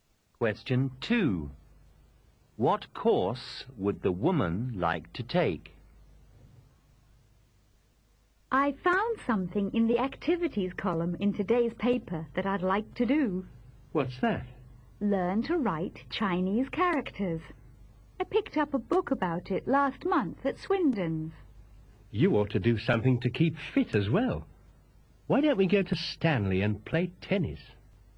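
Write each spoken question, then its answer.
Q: What course would the woman like to take?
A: Learning to write Chinese characters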